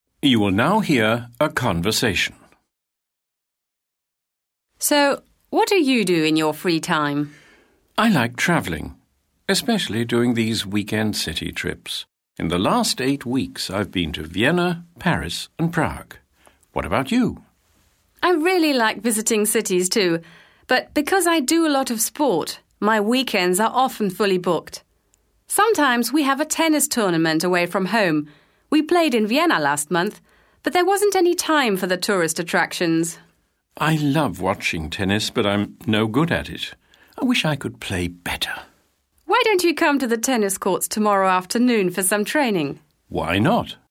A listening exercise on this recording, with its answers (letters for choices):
Choose the right answers.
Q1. The man is a good tennis player.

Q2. The woman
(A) thinks sightseeing is a waste of time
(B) enjoys travelling when she has time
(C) has been sightseeing in Vienna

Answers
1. false
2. B